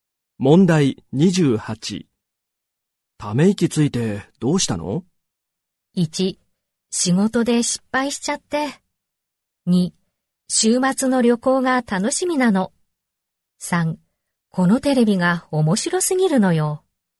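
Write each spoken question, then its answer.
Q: ため息ついてどうしたの?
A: 1: 仕事で失敗しちゃって。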